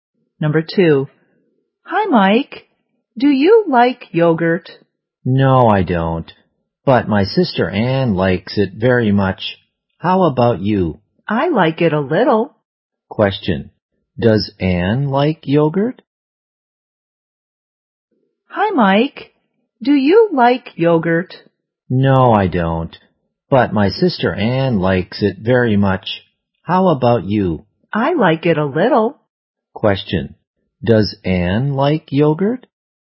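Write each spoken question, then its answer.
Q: does Anne like yogurt?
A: Yes, very much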